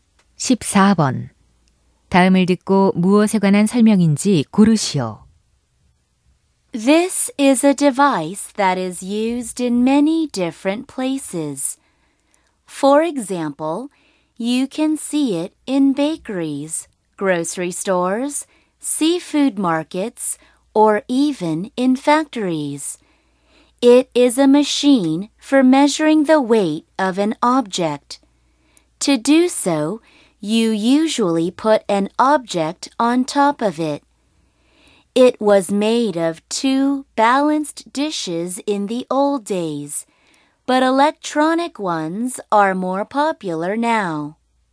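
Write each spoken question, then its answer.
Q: 다음을 듣고 무엇에 관한 설명인지 고르시오.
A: 저울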